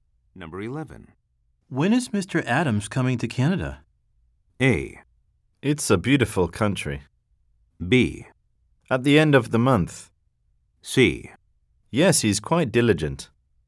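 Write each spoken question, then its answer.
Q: When is Mr. Adams coming to Canada?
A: B: At the end of the month.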